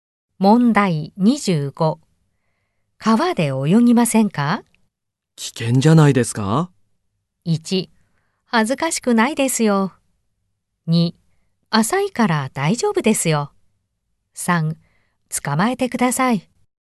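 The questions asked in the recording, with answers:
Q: 川で泳ぎませんか?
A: 2: 浅いから大丈夫ですよ。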